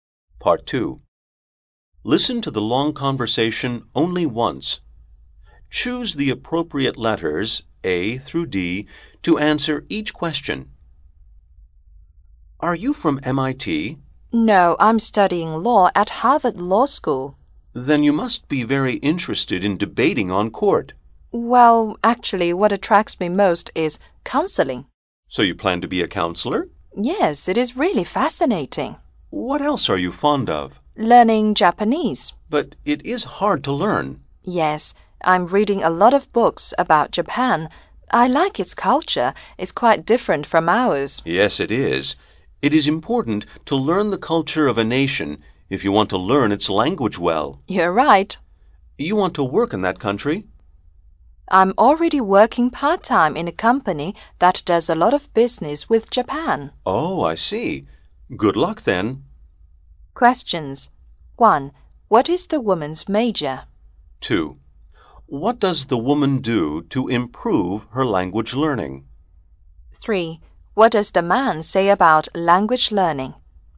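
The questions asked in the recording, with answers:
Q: What is the woman's major?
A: Law

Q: What does the woman do to improve her language learning?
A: She reads a lot of books about Japan

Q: What does the man say about language learning?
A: It is important to learn a nation's culture to learn its language well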